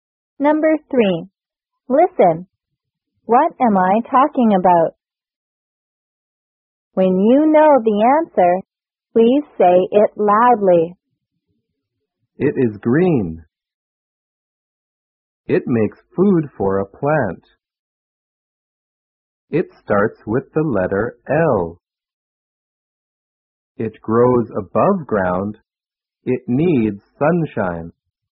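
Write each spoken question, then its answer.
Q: What am I talking about?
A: A leaf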